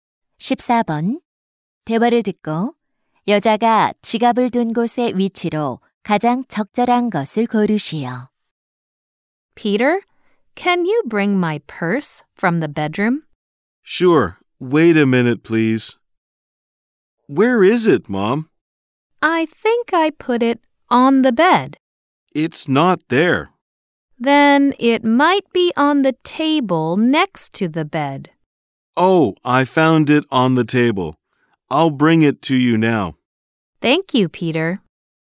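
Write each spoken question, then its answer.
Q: 대화를 듣고 여자가 지갑을 둔 곳의 위치로 가장 적절한 것을 고르시오.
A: 침대 옆 탁자 위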